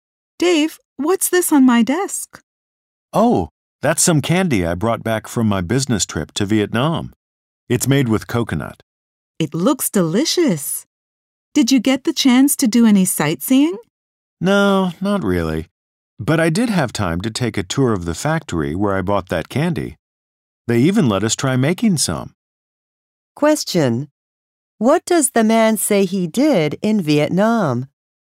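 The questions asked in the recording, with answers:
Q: What does the man say he did in Vietnam?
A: He toured the candy factory and tried making candy.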